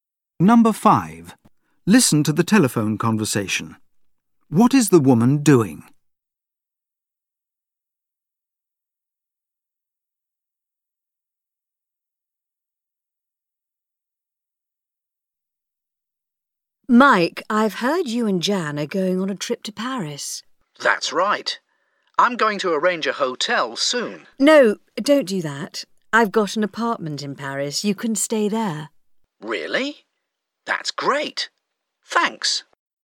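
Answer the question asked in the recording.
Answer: Offering Mike and Jan her apartment in Paris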